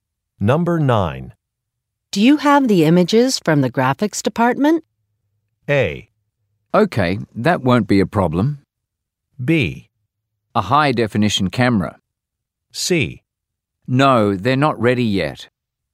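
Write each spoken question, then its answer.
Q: Do you have the images from the graphics department?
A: C: No, they're not ready yet.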